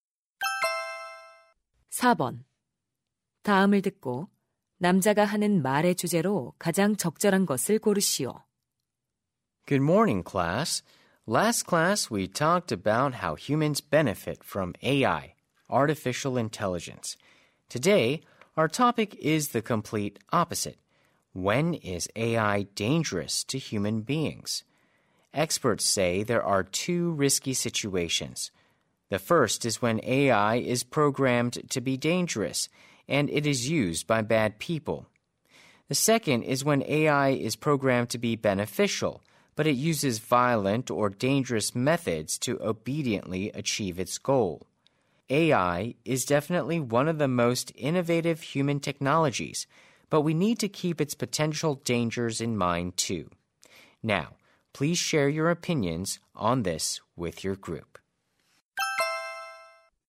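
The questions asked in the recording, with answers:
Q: 다음을 듣고 남자가 하는 말의 주제로 가장 적절한 것을 고르시오.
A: AI가 인간에게 위험해지는 상황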